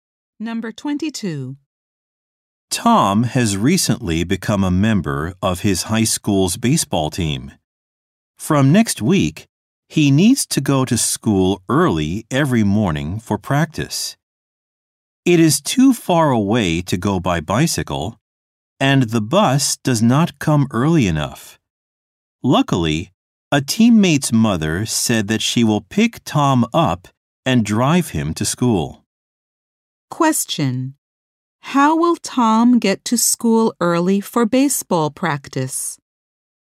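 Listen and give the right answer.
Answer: A teammate's mother will drive him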